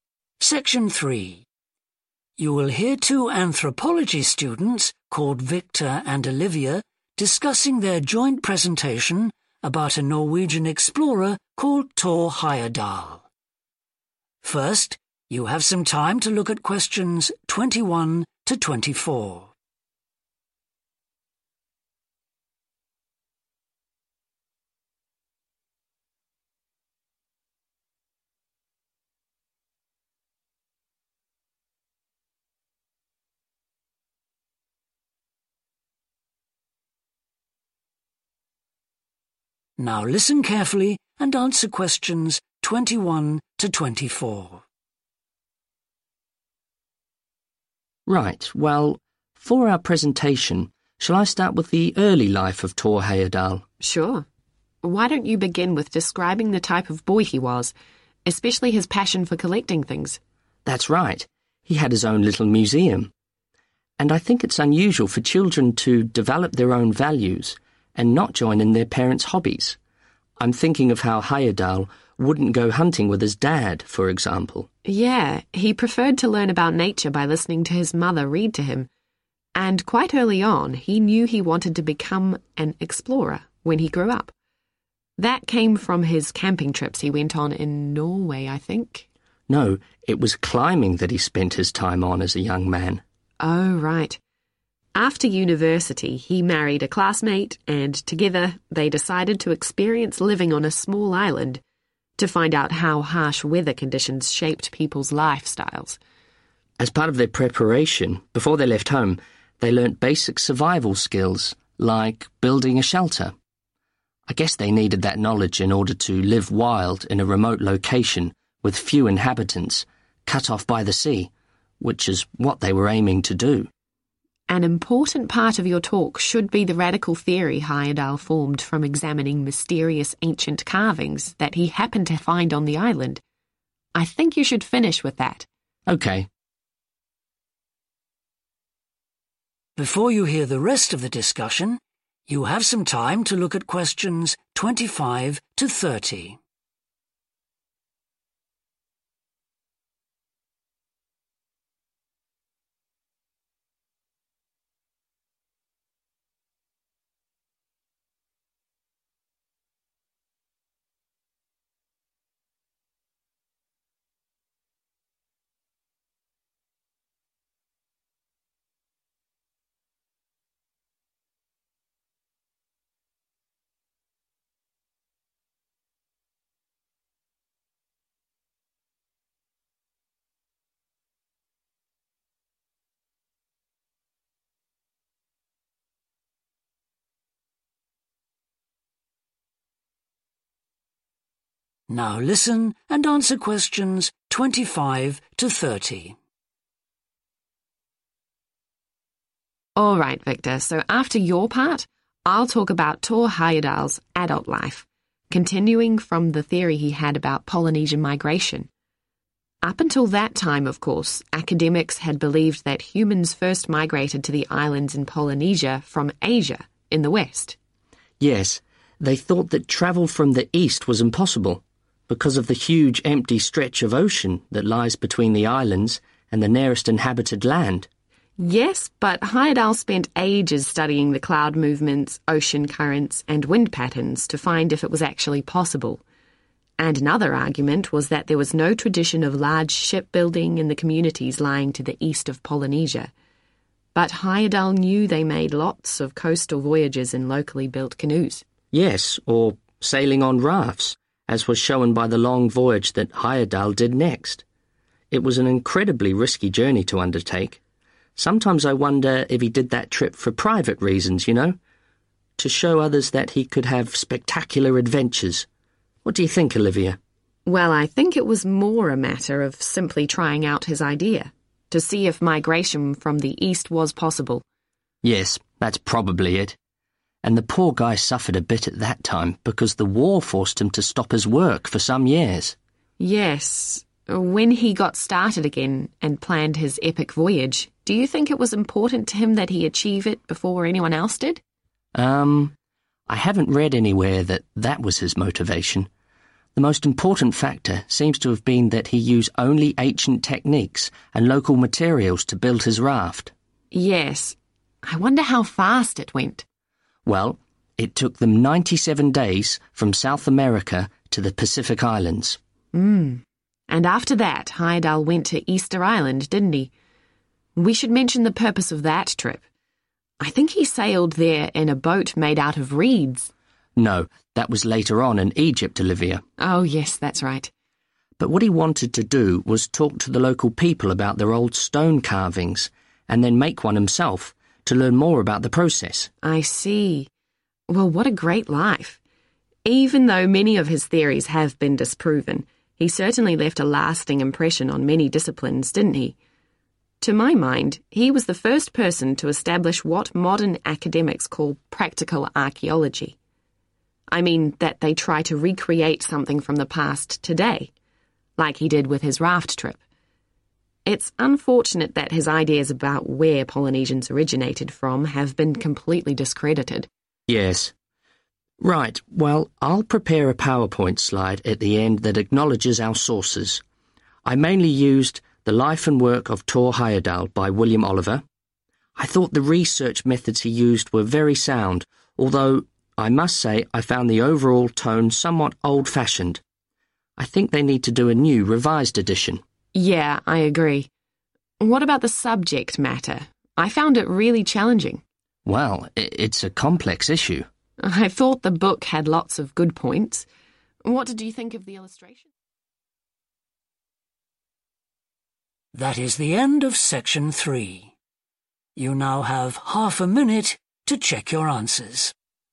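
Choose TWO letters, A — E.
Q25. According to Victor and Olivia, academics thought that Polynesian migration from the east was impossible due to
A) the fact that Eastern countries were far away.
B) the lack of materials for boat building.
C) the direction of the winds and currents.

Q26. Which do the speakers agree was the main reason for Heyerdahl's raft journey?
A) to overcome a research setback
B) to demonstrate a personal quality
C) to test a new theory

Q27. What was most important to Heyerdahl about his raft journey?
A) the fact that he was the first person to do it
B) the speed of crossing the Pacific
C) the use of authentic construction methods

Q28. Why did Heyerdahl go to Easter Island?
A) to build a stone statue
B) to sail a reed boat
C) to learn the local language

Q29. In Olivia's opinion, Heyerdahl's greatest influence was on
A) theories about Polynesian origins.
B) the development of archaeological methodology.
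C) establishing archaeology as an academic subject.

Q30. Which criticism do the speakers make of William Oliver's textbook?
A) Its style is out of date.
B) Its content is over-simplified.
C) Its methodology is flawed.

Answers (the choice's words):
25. the fact that Eastern countries were far away.
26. to test a new theory
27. the use of authentic construction methods
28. to build a stone statue
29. the development of archaeological methodology.
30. Its style is out of date.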